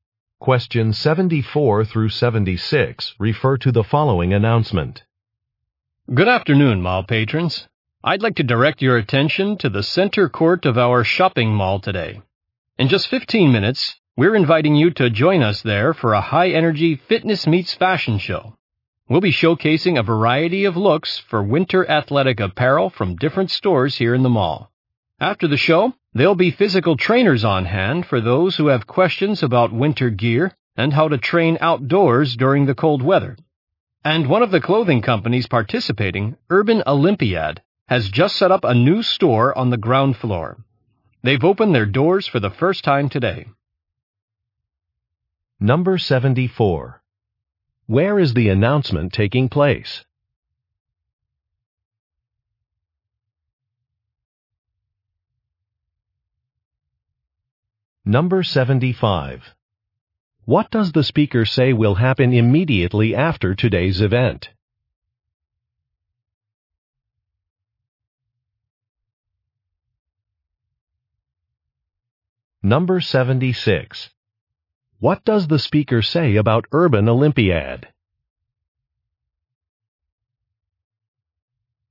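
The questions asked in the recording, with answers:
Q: Where is the announcement taking place?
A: At a shopping mall

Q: What does the speaker say will happen immediately after today's event?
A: Physical trainers will answer questions about winter gear and training outdoors

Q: What does the speaker say about Urban Olympiad?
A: It just opened a new store on the ground floor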